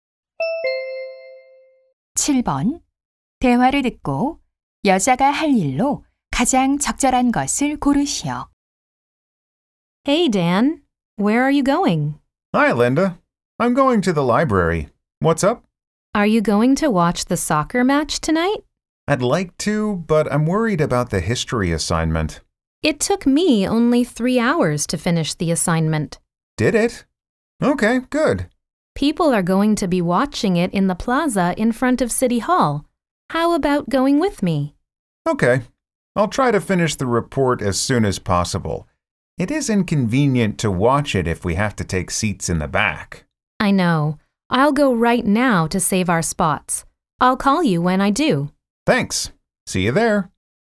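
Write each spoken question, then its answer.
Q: 대화를 듣고 여자가 할 일로 가장 적절한 것을 고르시오.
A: 시청 앞 광장에 가서 자리 맡기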